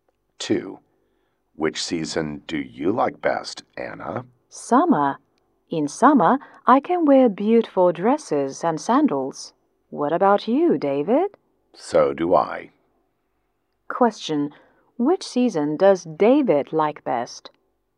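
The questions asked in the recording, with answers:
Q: Which season does David like best?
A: Summer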